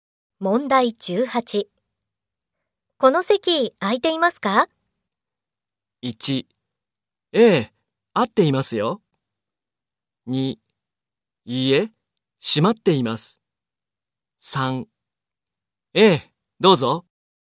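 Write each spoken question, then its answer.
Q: この席空いていますか?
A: 3: ええ、どうぞ。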